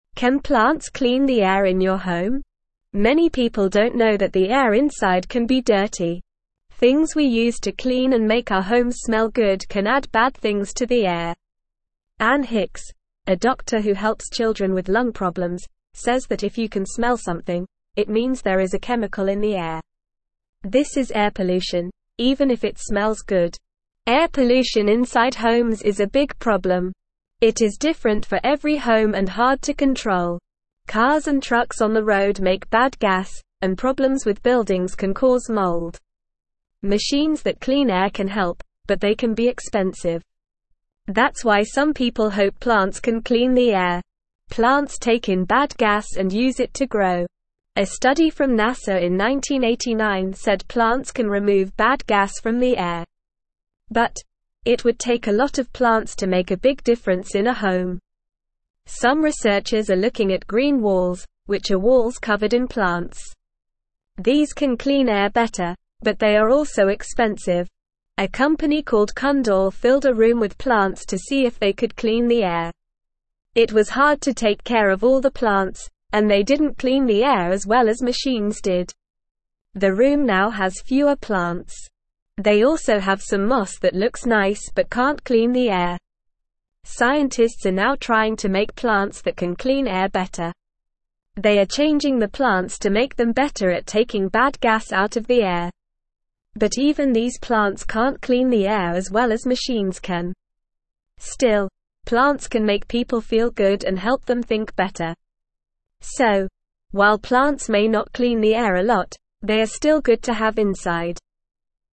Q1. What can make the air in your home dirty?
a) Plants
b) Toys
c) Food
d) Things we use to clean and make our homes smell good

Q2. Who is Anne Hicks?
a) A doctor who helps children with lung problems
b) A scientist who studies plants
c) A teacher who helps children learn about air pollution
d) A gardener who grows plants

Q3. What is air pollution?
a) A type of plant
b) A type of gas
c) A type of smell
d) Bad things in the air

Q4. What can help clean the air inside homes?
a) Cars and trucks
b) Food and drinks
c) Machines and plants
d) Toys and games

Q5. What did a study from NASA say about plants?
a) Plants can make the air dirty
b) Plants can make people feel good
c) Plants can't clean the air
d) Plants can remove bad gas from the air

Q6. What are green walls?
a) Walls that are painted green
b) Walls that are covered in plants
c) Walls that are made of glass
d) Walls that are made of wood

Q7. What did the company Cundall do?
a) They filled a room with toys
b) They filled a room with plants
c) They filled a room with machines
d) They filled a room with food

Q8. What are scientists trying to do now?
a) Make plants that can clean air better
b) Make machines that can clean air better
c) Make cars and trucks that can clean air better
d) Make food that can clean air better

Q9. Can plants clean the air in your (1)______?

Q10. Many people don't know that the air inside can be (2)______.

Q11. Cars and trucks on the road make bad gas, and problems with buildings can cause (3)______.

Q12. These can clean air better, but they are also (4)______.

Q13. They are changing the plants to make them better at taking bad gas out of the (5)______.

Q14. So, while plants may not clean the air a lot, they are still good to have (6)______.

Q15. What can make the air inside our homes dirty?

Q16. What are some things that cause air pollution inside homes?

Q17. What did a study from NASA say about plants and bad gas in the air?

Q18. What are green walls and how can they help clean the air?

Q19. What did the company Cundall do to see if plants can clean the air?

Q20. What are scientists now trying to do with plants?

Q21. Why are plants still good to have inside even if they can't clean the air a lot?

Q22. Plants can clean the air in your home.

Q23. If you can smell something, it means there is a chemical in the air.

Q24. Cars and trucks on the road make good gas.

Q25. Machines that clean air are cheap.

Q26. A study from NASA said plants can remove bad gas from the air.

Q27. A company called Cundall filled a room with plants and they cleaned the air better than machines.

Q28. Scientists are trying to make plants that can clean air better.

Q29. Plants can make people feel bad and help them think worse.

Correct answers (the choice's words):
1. Things we use to clean and make our homes smell good
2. A doctor who helps children with lung problems
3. Bad things in the air
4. Machines and plants
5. Plants can remove bad gas from the air
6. Walls that are covered in plants
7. They filled a room with plants
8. Make plants that can clean air better
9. home
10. dirty
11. mold
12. expensive
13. air
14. inside
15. Things we use to clean our homes and make them smell good can make the air inside our homes dirty.
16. Cars and trucks on the road make bad gas, and problems with buildings can cause mold. These things can cause air pollution inside homes.
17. A study from NASA said that plants can take in bad gas and use it to grow. This can help clean the air.
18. Green walls are walls covered in plants. They can help clean the air better than just a few plants.
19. Cundall filled a room with plants to see if they could clean the air.
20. Scientists are now trying to change plants to make them better at taking bad gas out of the air.
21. Even if plants can't clean the air a lot, they can make people feel good and help them think better. So, they are still good to have inside.
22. True
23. True
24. False
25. False
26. True
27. False
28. True
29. False

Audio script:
Can plants clean the air in your home? Many people don't know that the air inside can be dirty. Things we use to clean and make our homes smell good can add bad things to the air. Anne Hicks, a doctor who helps children with lung problems, says that if you can smell something, it means there is a chemical in the air. This is air pollution, even if it smells good.
Air pollution inside homes is a big problem. It is different for every home and hard to control. Cars and trucks on the road make bad gas, and problems with buildings can cause mold. Machines that clean air can help, but they can be expensive. That's why some people hope plants can clean the air.
Plants take in bad gas and use it to grow. A study from NASA in 1989 said plants can remove bad gas from the air. But, it would take a lot of plants to make a big difference in a home. Some researchers are looking at green walls, which are walls covered in plants. These can clean air better, but they are also expensive.
A company called Cundall filled a room with plants to see if they could clean the air. It was hard to take care of all the plants, and they didn't clean the air as well as machines did. The room now has fewer plants. They also have some moss that looks nice but can't clean the air.
Scientists are now trying to make plants that can clean air better. They are changing the plants to make them better at taking bad gas out of the air. Still, plants can make people feel good and help them think better. So, while plants may not clean the air a lot, they are still good to have inside.

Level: Level 1